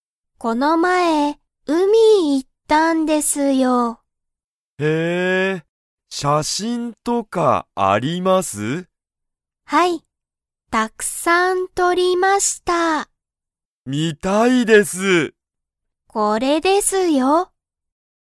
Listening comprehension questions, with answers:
Comprehension Quiz (Skip if you don't understand the conversation yet)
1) 渡辺(わたなべ)さんは、____を見(み)たい。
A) ラーメン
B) 写真(しゃしん)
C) 仕事(しごと)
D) 家(いえ)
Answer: B) 写真(しゃしん)

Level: Level 1

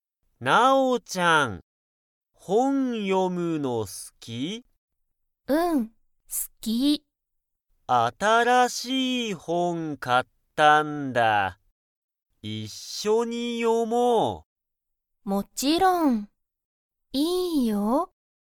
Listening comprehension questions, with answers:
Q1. レンは、____本(ほん)を買(か)った。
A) 面白(おもしろ)い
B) 一緒(いっしょ)の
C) 好(す)きな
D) 新(あたら)しい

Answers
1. D) 新(あたら)しい

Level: Level 1

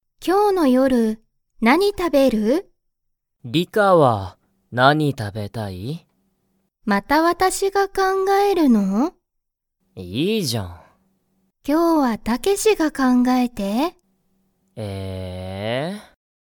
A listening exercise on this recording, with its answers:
Comprehension Quiz (Skip if you don't understand the conversation yet)(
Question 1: リカとタケシは、____ご飯はんを食たべる。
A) ちょうど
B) 最近さいきん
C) 今日きょうの夜よる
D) 日曜日にちようび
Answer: C) 今日きょうの夜よる

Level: Level 1

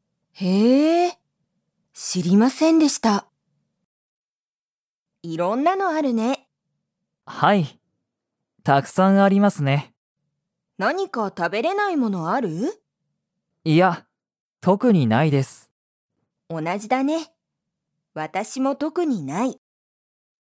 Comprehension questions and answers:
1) ナオキは、食たべれないものがありますか?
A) はい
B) いいえ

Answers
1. B) いいえ

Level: Level 1

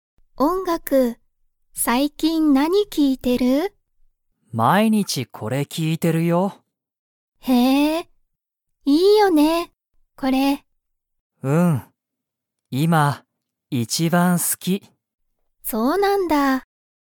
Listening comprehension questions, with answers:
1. ナオキは、____その音楽おんがくを聴きいている。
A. この後あと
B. あまり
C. 毎日まいにち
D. この前まえ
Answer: C. 毎日まいにち

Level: Level 1

